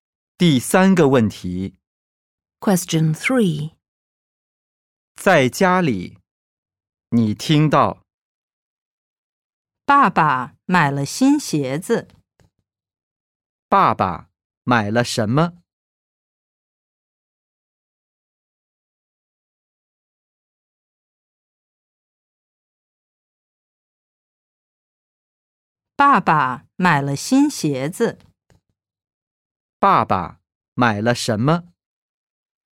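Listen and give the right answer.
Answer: 新鞋子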